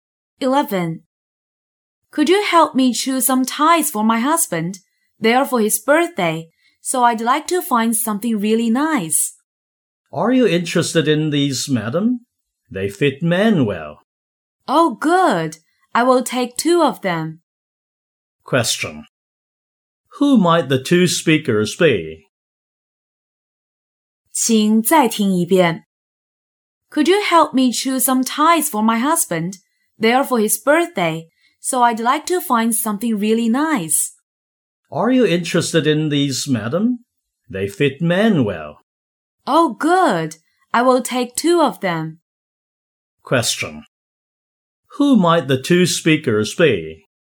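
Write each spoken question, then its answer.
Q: Who might the two speakers be?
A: A shop assistant and a customer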